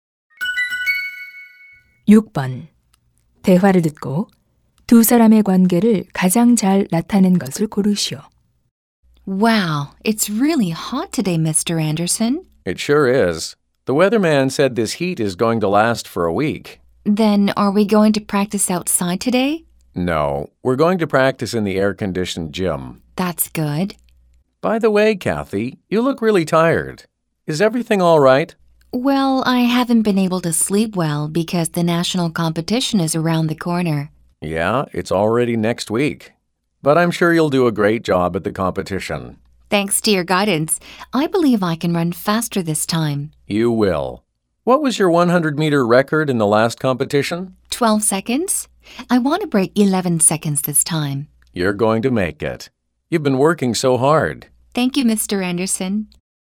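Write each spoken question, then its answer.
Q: 대화를 듣고 두 사람의 관계를 가장 잘 나타낸 것을 고르시오.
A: 육상 코치와 선수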